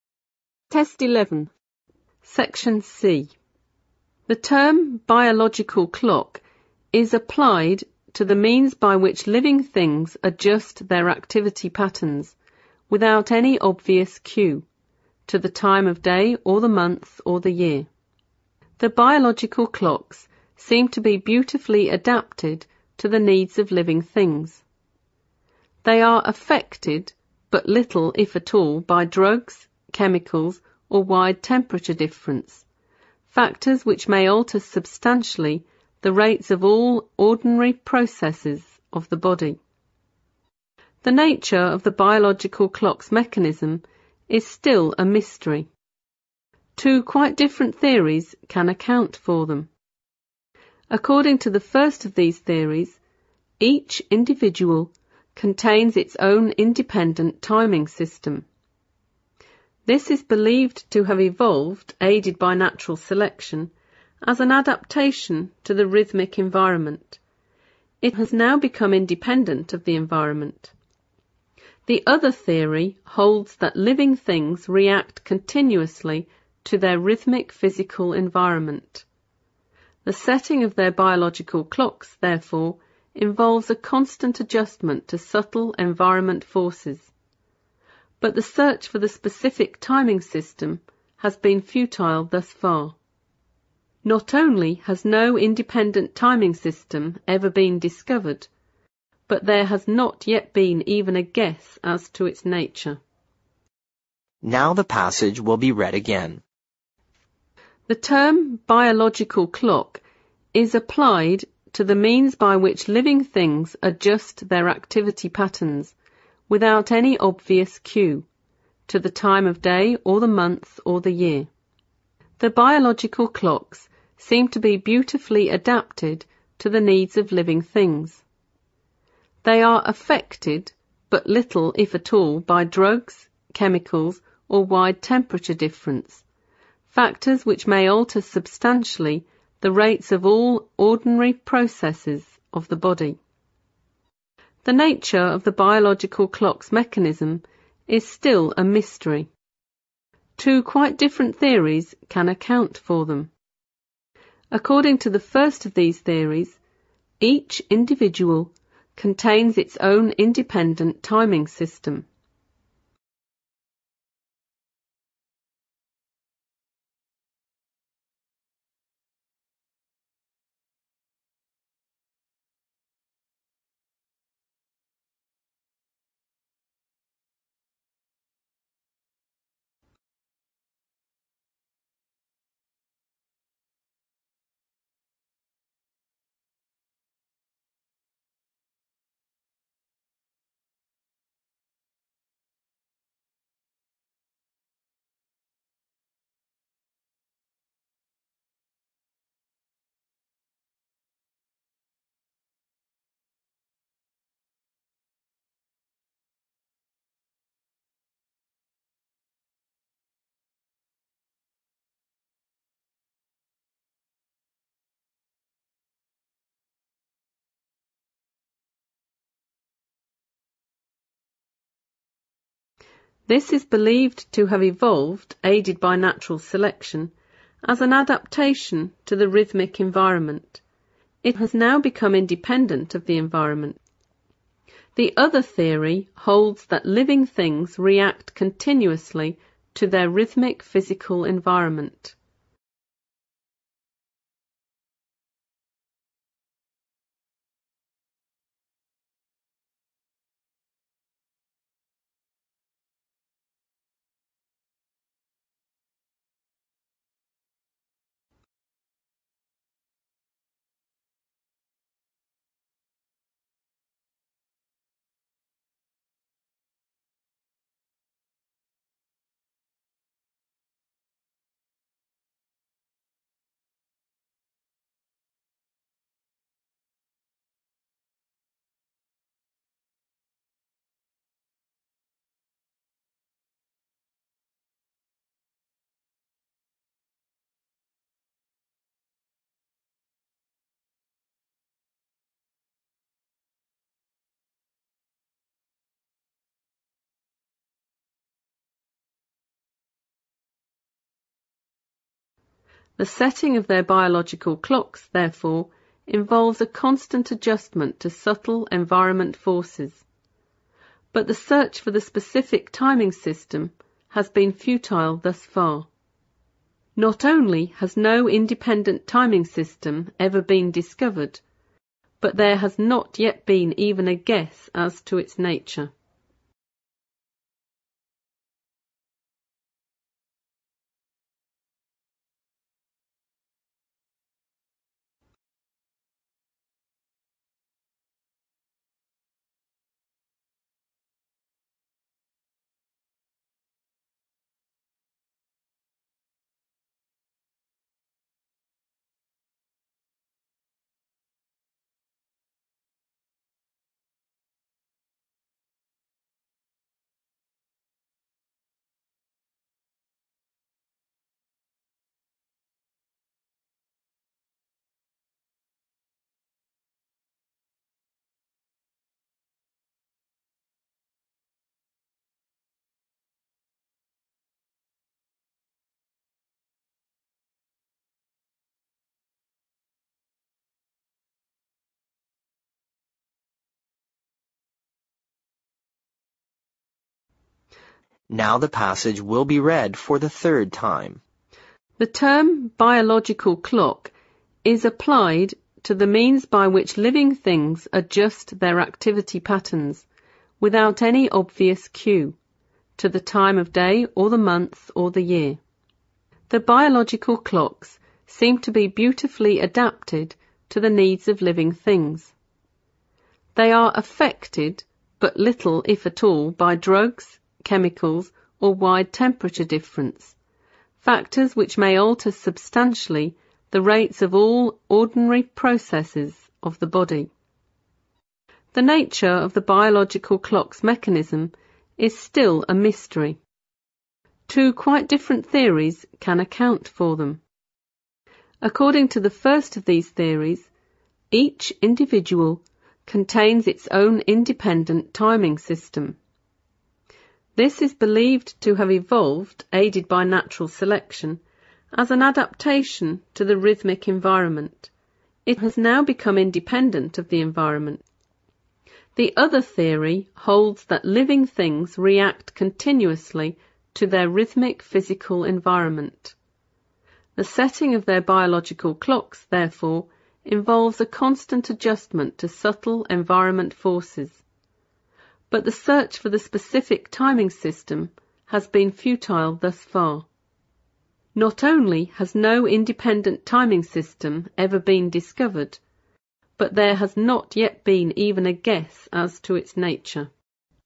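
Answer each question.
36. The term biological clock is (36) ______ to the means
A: applied

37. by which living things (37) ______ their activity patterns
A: adjust

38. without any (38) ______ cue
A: obvious

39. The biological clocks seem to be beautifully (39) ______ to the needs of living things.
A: adapted

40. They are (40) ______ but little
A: affected

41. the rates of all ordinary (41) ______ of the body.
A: processes

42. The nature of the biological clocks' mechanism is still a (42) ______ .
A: mystery

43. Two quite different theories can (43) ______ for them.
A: account

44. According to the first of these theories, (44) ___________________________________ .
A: each individual contains its own independent timing system

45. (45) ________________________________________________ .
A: The other theory holds that living things react continuously to their rhythmic physical environment

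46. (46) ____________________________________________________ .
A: Not only has no independent timing system ever been discovered, but there has not yet been even a guess as to its nature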